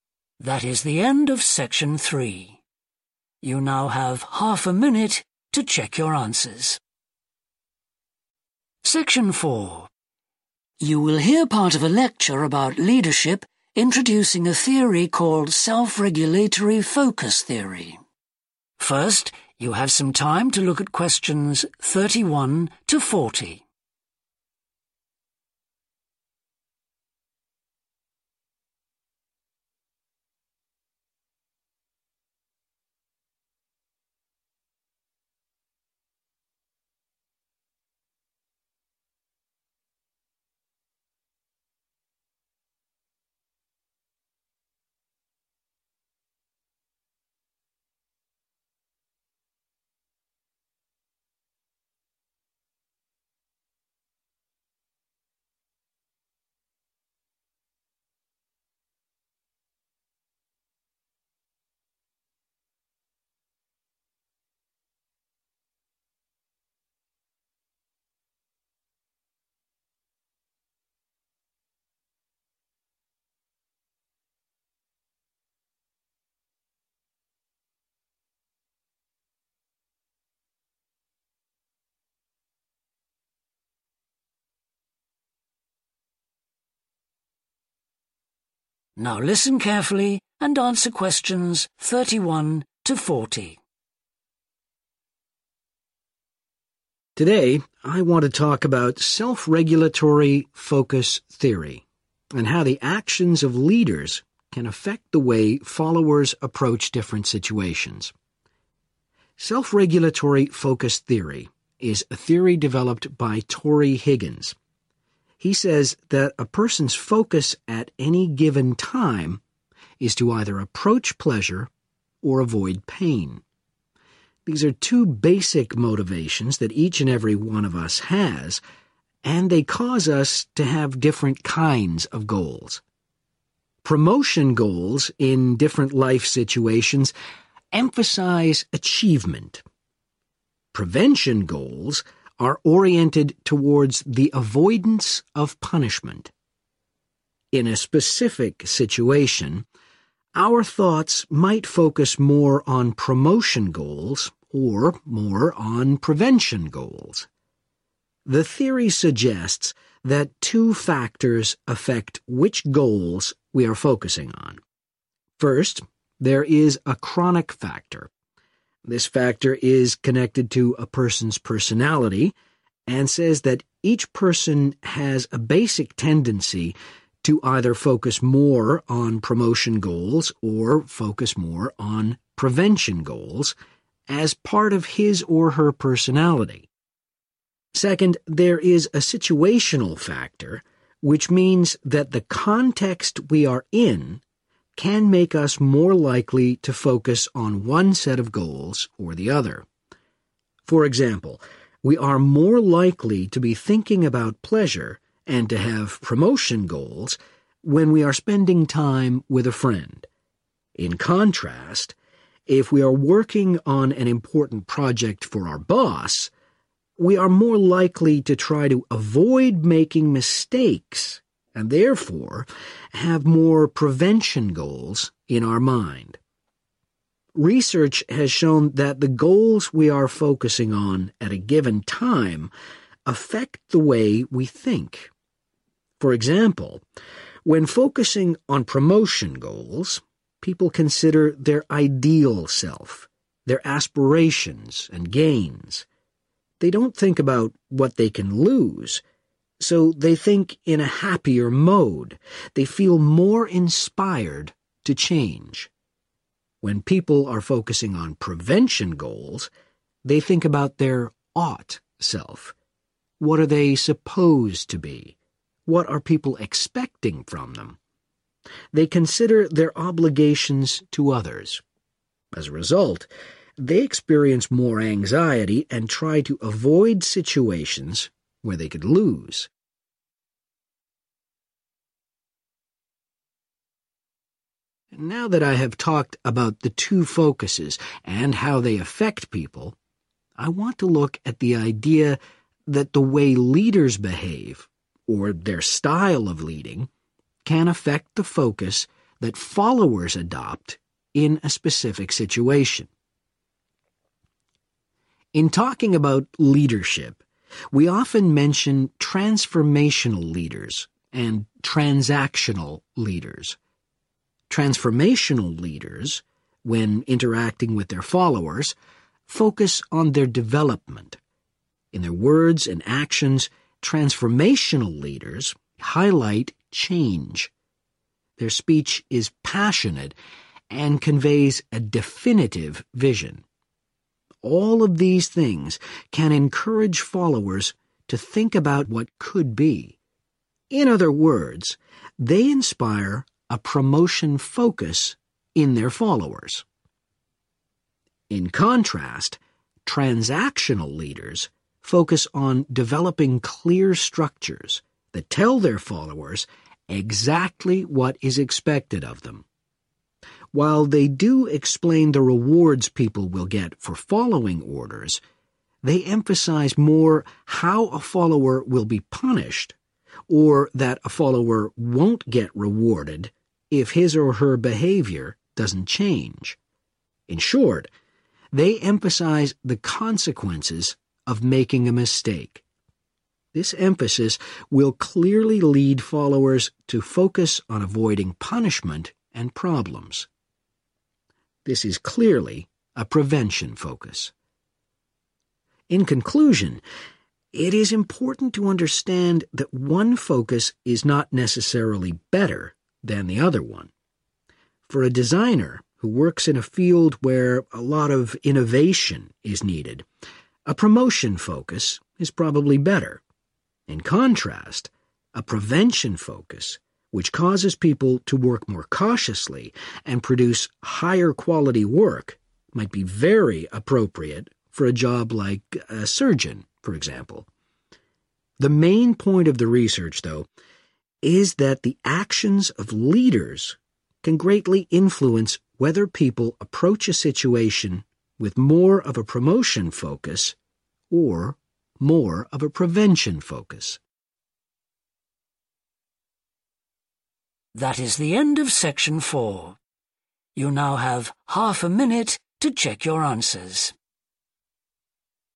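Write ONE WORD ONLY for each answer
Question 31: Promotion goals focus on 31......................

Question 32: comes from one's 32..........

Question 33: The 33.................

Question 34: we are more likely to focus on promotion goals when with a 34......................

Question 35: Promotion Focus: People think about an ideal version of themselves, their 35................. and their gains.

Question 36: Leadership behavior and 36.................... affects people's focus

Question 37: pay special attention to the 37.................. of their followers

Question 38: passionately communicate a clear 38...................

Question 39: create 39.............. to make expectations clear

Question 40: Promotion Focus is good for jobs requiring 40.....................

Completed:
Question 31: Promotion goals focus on achievement
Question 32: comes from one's personality
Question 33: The situational
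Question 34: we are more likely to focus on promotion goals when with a friend
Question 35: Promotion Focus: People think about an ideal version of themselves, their aspirations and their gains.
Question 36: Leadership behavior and style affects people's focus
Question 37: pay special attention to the development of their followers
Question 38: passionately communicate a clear vision
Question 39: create structures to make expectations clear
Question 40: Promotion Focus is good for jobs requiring innovation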